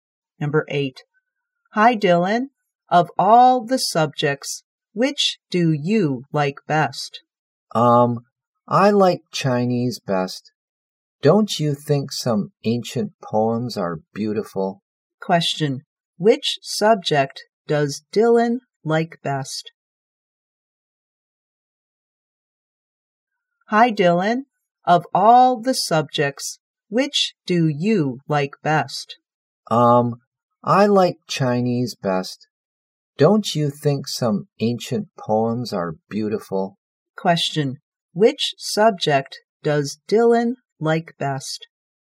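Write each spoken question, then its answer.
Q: Question. Which subject does Dylan like best?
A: Chinese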